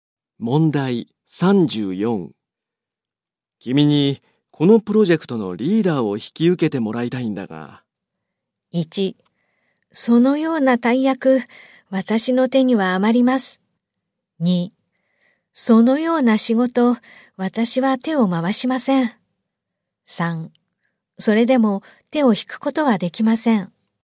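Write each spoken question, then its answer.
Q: 君にこのプロジェクトのリーダーを引き受けてもらいたいんだが。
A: 1: そのような大役、私の手には余ります。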